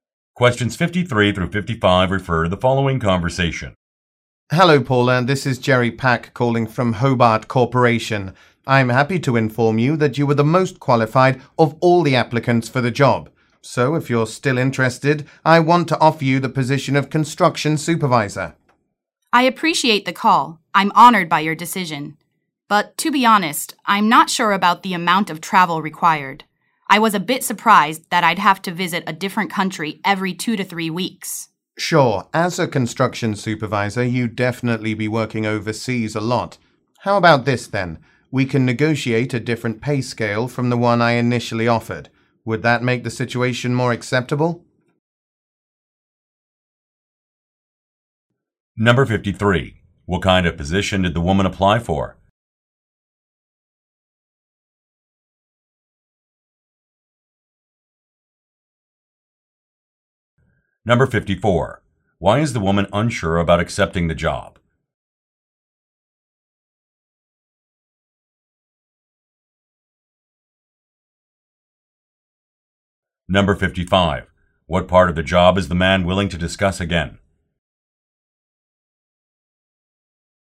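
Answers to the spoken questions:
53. Construction supervisor
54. It requires a lot of overseas travel
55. The pay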